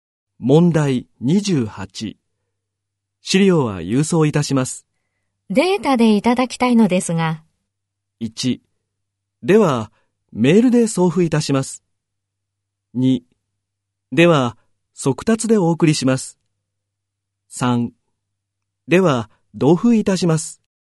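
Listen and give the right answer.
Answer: 1: では、メールで送付いたします。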